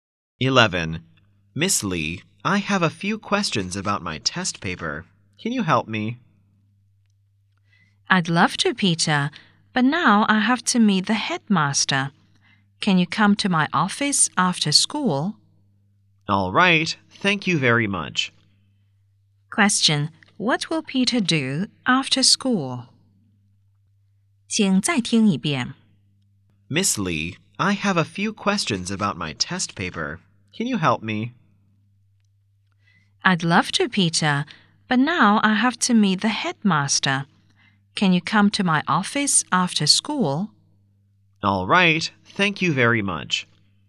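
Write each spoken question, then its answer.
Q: What will Peter do after school?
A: Go to Miss Lee's office to ask about his test paper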